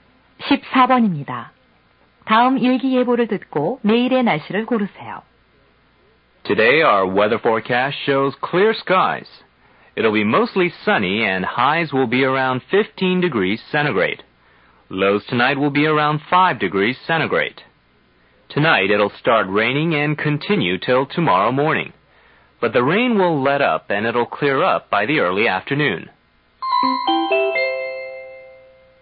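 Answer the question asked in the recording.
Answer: 오전에 비, 이른 오후부터 갬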